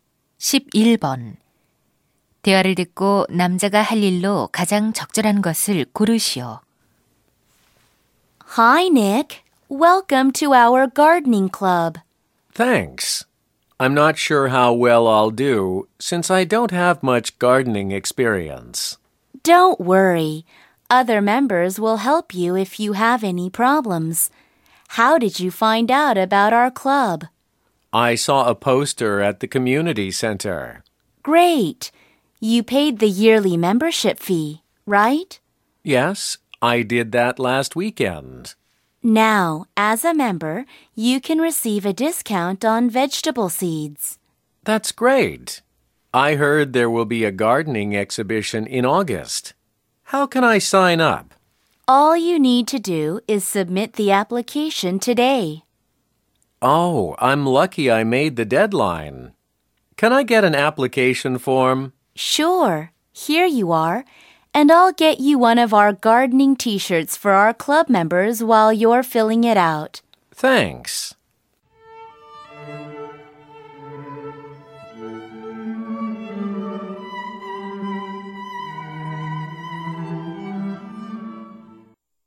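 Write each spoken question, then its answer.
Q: 대화를 듣고 남자가 할 일로 가장 적절한 것을 고르시오.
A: 전시회 신청서 작성하기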